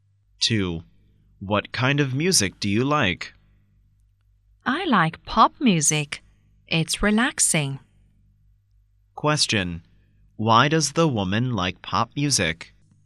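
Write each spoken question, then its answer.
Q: Why does the woman like pop music?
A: It's relaxing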